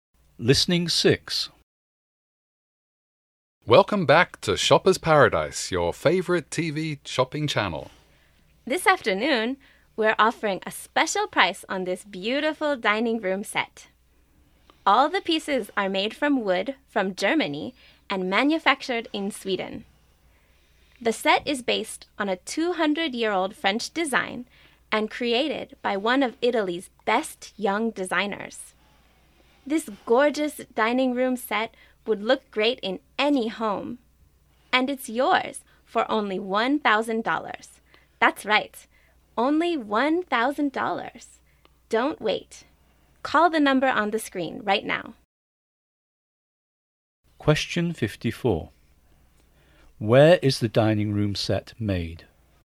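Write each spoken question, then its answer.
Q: Where is the dining room set made?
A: In Sweden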